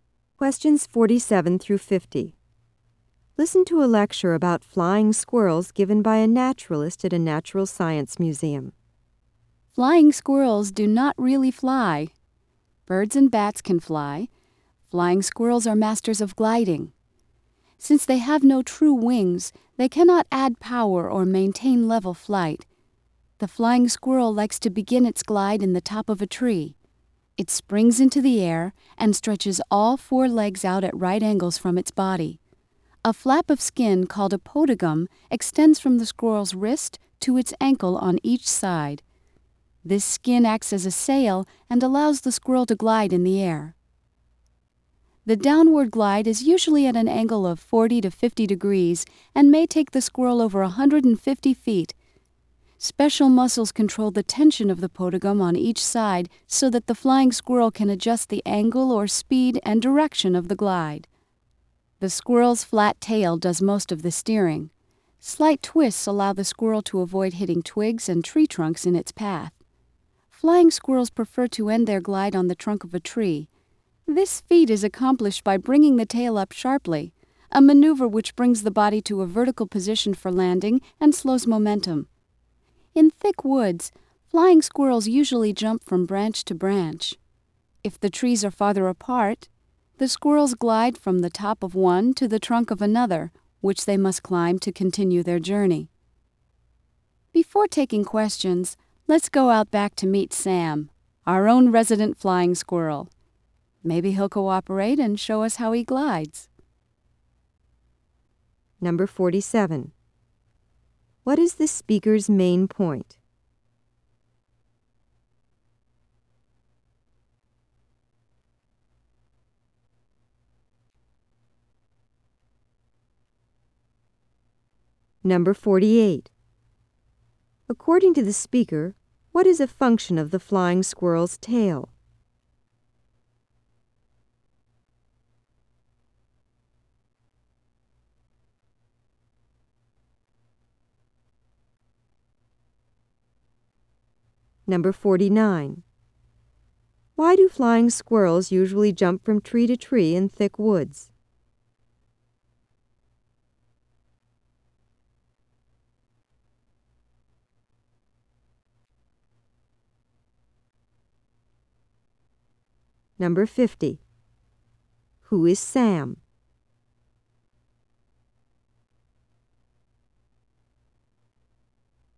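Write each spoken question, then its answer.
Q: What is the speaker's main point?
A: Flying squirrels glide rather than really fly

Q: According to the speaker, what is a function of the flying squirrel's tail?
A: Steering (and slowing down for landing)

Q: Who is Sam?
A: The museum's resident flying squirrel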